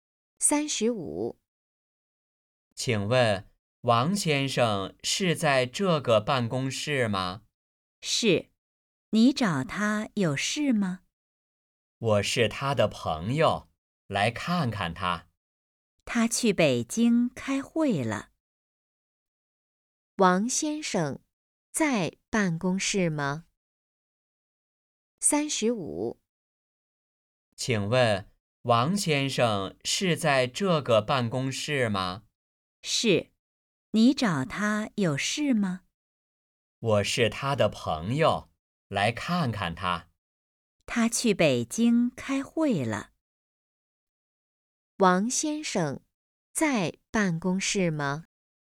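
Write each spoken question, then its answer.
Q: 王先生在办公室吗?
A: 不在,他去北京开会了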